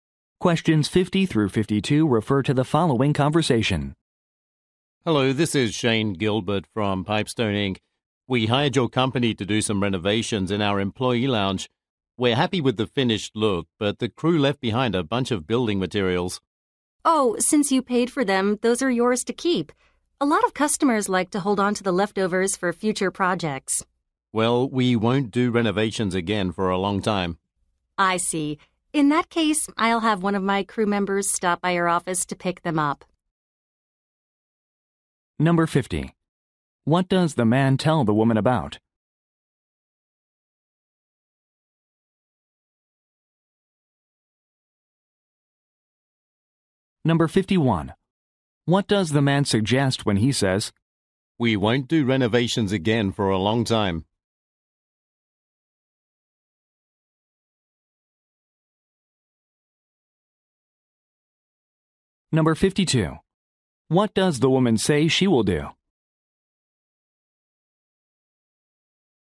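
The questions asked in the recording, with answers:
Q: What does the man tell the woman about?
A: Leftover building materials

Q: What does the man suggest when he says,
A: He doesn't want to keep the materials

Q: What does the woman say she will do?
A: Send a crew member to pick up the materials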